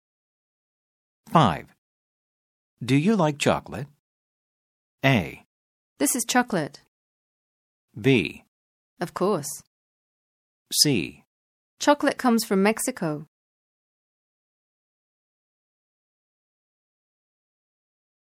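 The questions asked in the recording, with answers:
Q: Do you like chocolate?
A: B: Of course.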